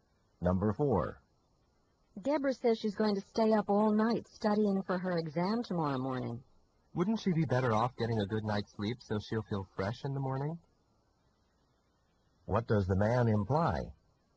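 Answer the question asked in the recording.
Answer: Deborah should sleep instead of studying all night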